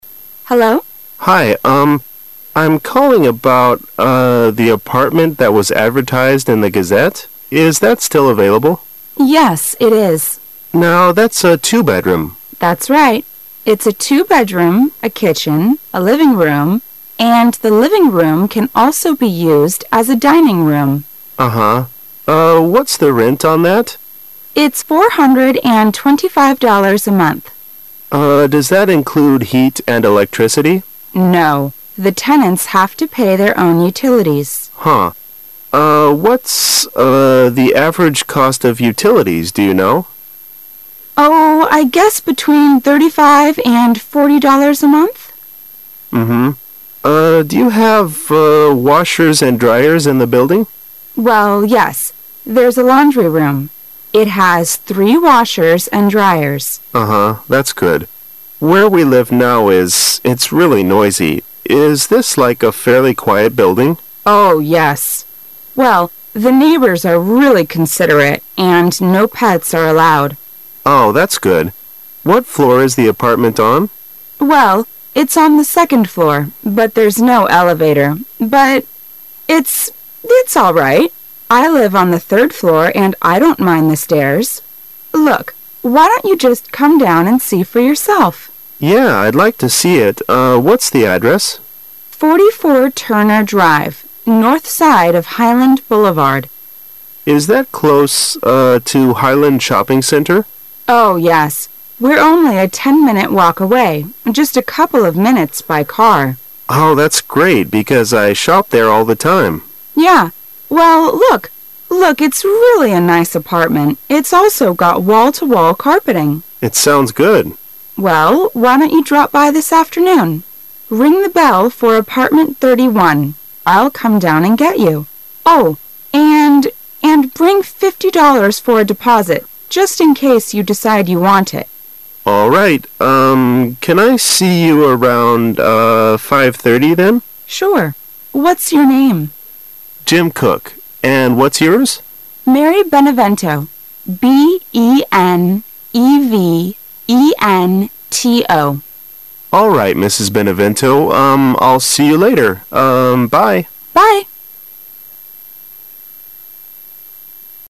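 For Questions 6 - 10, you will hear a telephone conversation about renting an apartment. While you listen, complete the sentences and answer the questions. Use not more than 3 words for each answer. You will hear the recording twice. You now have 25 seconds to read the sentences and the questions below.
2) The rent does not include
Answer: heat and electricity

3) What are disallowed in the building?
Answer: Pets

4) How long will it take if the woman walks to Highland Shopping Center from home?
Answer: 10 minutes

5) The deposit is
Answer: $50

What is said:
I'm calling about.., uh... the apartment that was advertised in the Gazette. Is that still available? W: Yes. it is. M: Now, that's a two-bedroom? W: That's right. It's a two-bedroom, a kitchen, a living room, and the living room can also be used as a dining room. M: Uh-huh. Uh. what's the rent on that? M: Uh, does that include heat and electricity? 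W: No. The tenants have to pay their own utilities. M: Huh. Uh, what's... uh... the average cost of utilities, do you know? W: Oh, I guess between thirty-five and forty dollars a month. M: Mm-hmm. Uh... do you have.., uh... washers and dryers in the building? W: Well, yes. There's a laundry room. It has three washers and dryers. M: Uh-huh, That's good. Where we live now is... it's really noisy. Is this like a fairly quiet building? W: Oh, yes ! Well, the neighbors are really considerate, and no pets are allowed. M: Oh, that's good. What floor is the apartment on? W: Well. it's on the second floor, but there's no elevator. But it's.., it's all right. I live on the third floor and I don't mind the stairs. Look, why don't you just come down and see for yourself? M: Yeah, I'd like to see it, uh.., what's the address? North side of Highland Boulevard. M: Is that close, uh, to Highland Shopping Center? 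W: Oh, yes, We're only a ten-minute walk away, just a couple of minutes by car. M: Oh, that's great. because I shop there all the time. W: Yeah. Well, look... look. it's really a nice apartment. It's also got wall-to-wall carpeting. M: It sounds good. W: Well, why don't you drop by this afternoon? Ring the bell for apartment thirty-one. I'll come down and get you. Oh, and... and bring fifty dollars for a deposit, just in case you decide you want it. M: All right, urn.., can I see you around.., uh... W: Sure. What's your name? M: Jim Cook. And what's yours? W: Mary Benevento. B-E-NoE-V-E-N-T-O. M: All right, Mrs. Benevento, um...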